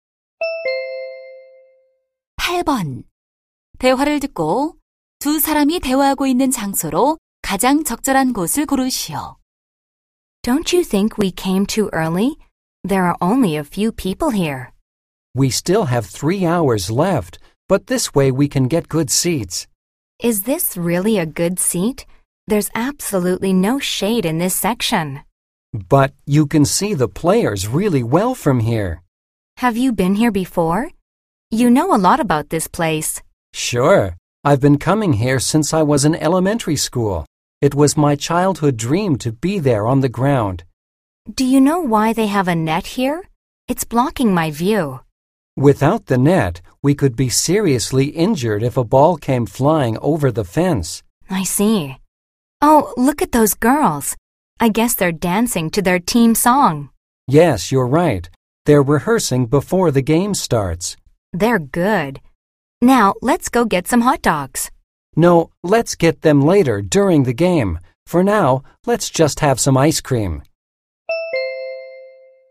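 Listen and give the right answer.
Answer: 야구장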